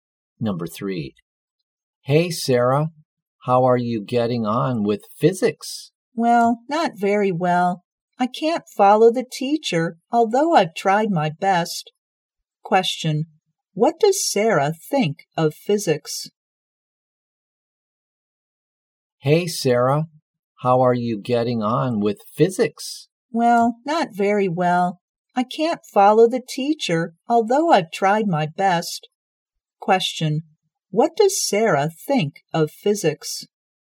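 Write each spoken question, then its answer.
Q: what does Sarah think of physics?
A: It's difficult for her.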